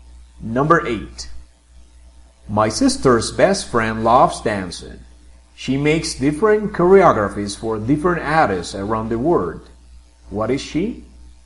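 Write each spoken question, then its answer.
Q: What is she?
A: a choreographer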